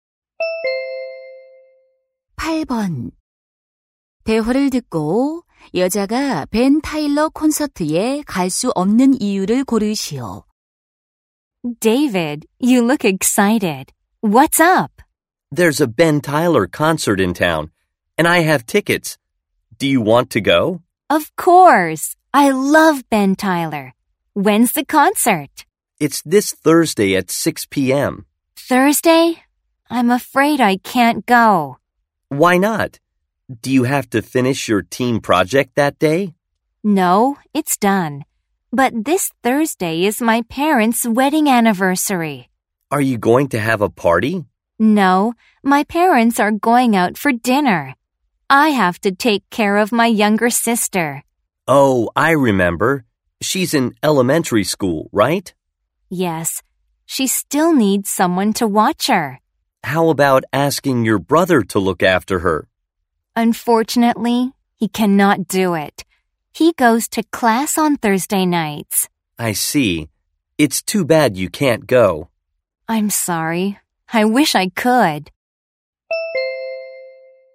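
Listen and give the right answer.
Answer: 여동생을 돌봐야 해서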